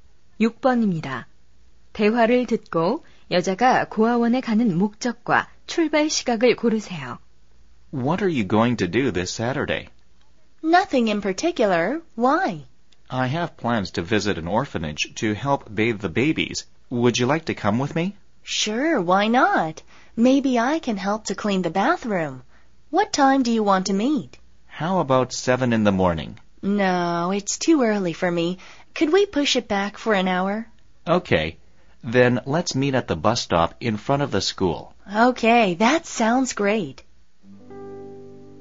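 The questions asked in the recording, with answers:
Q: 대화를 듣고 여자가 고아원에 가는 목적과 출발 시각을 고르세요.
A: 아기 목욕 돕기, 오전 8시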